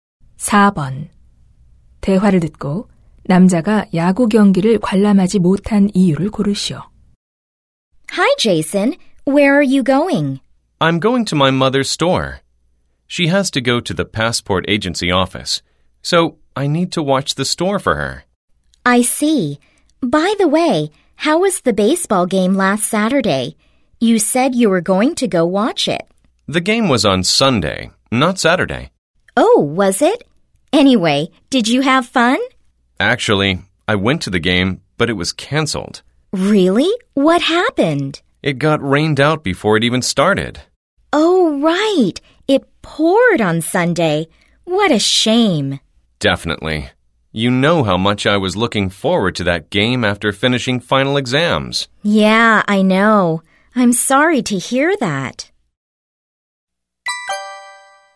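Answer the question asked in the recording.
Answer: 비 때문에 경기가 취소되어서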